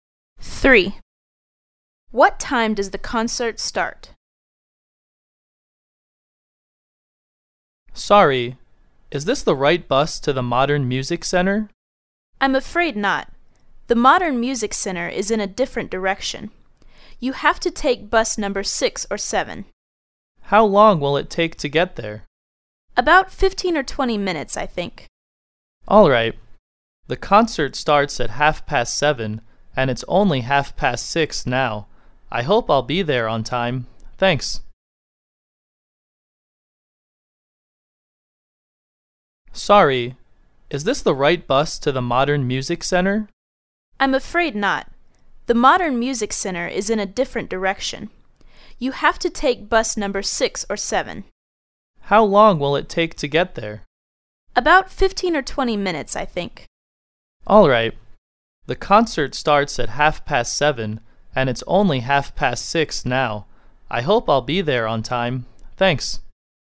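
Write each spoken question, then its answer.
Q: What time does the concert start?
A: At 7:30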